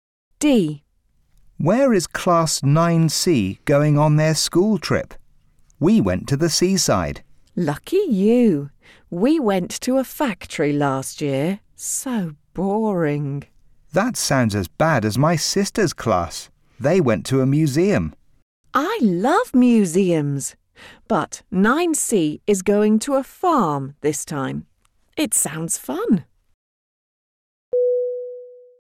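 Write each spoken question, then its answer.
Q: Where is Class 9C going on their school trip?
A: To a farm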